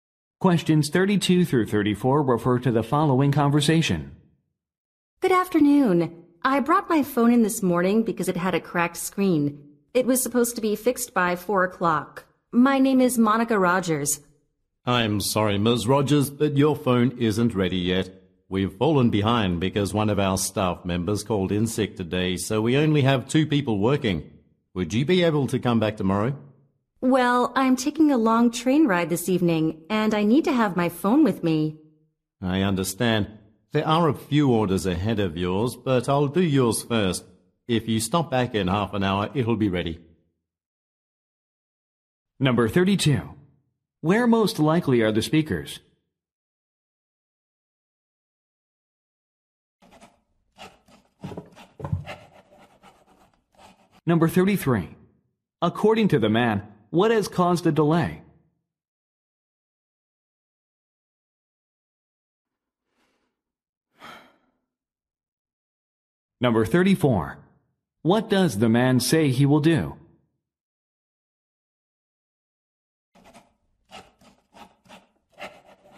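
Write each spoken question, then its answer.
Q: Where most likely are the speakers?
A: At a phone repair shop

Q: According to the man, what has caused the delay?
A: A staff member called in sick

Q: What does the man say he will do?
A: Repair her phone first, ready in half an hour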